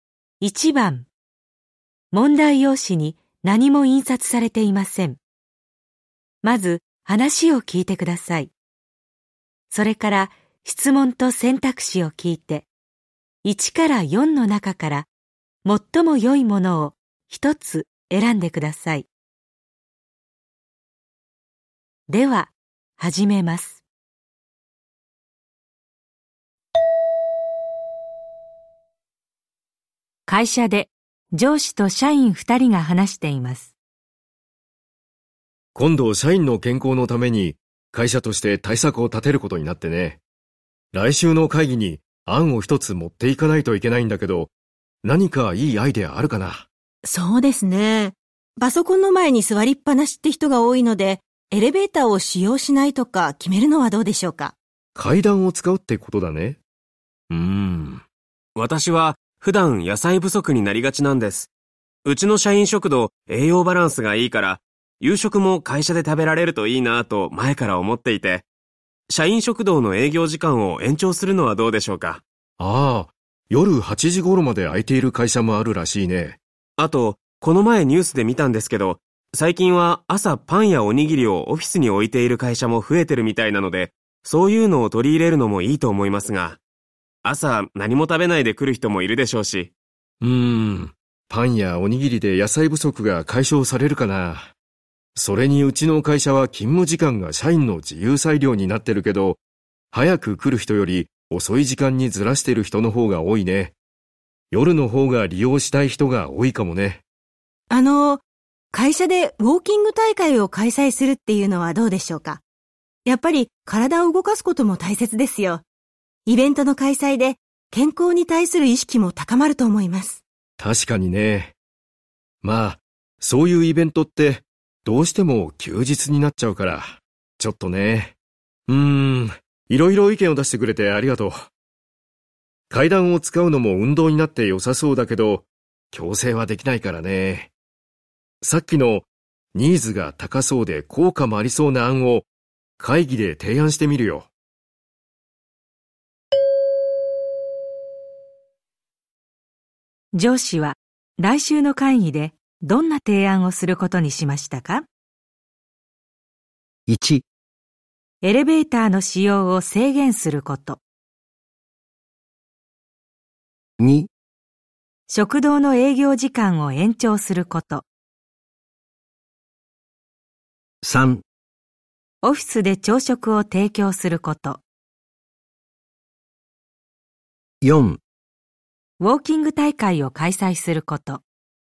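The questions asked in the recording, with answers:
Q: 上司は来週の会議でどんな提案をすることにしましたか?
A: 2: 食堂の営業時間を延長すること。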